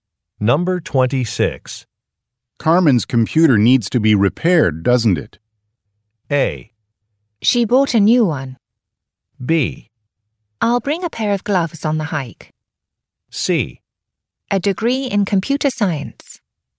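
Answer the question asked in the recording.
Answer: A: She bought a new one.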